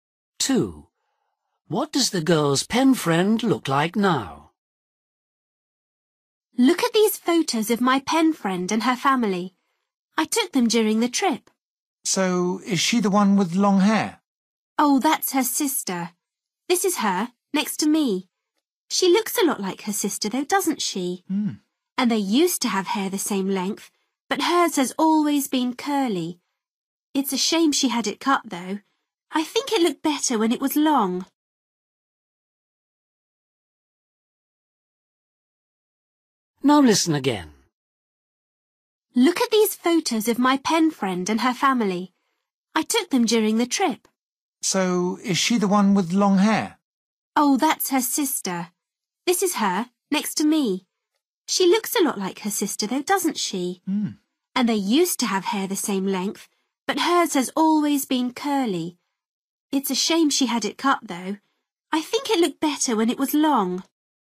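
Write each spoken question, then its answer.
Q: What does the girl's pen friend look like now?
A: short curly hair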